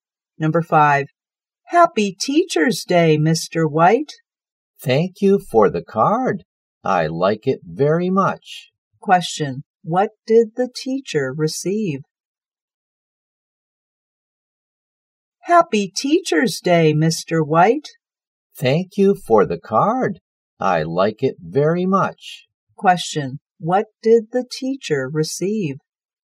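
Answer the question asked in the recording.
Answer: A card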